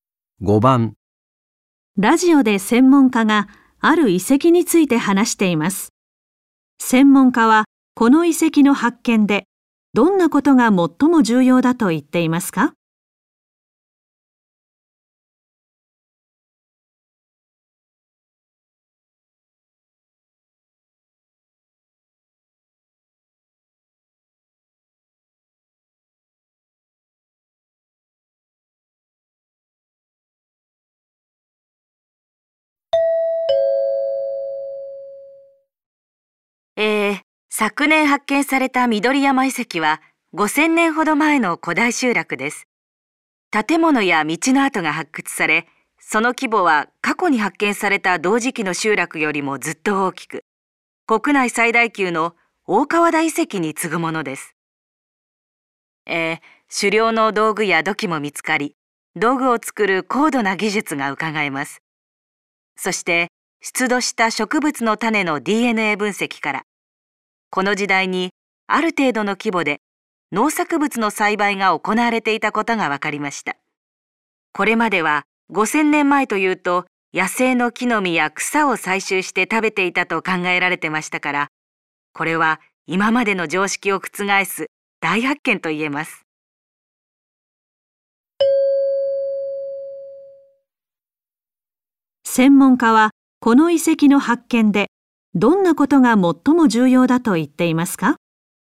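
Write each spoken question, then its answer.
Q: 専門家はこの遺跡の発見でどんなことが最も重要だと言っていますか?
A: 5000年前にある程度の規模で農作物の栽培が行われていたと分かったこと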